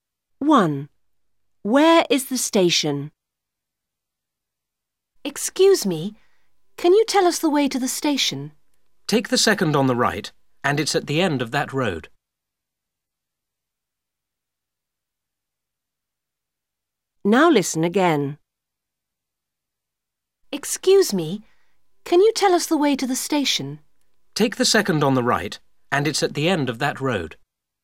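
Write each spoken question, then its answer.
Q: Where is the station?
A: At the end of the second road on the right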